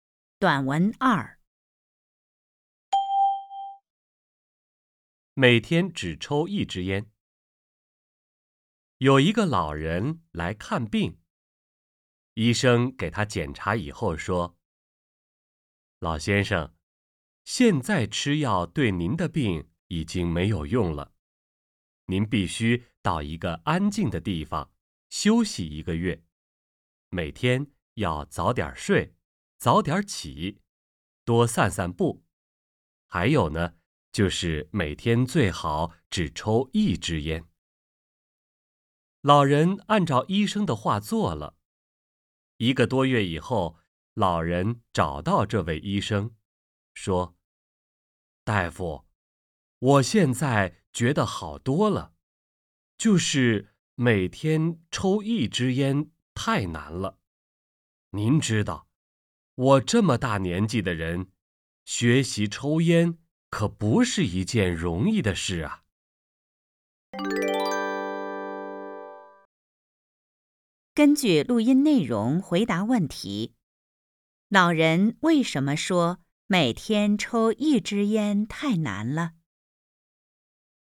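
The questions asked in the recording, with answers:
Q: 老人为什么说每天抽一支烟太难了?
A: 因为他以前不抽烟,这么大年纪学抽烟不容易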